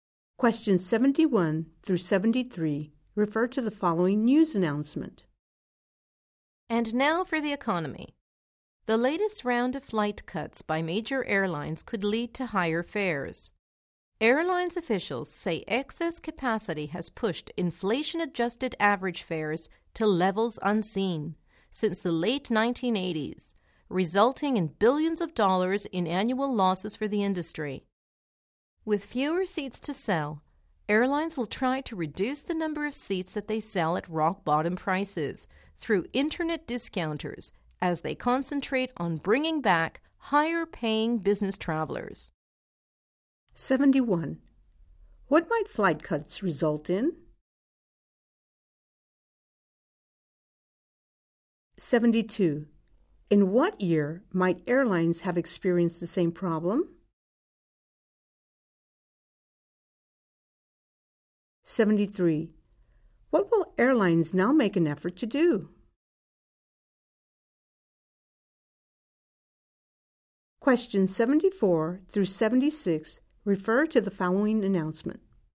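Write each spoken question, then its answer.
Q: What might flight cuts result in?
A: Higher fares

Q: What will airlines now make an effort to do?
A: Sell fewer rock-bottom-price seats and bring back higher-paying business travelers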